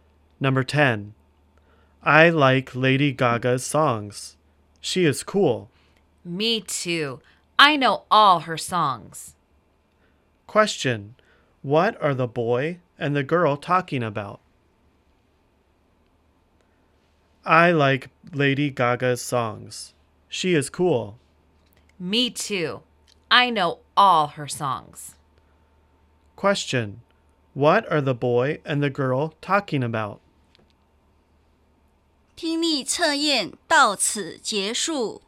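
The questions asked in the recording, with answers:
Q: what are the boy and the girl talking about?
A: Lady Gaga's songs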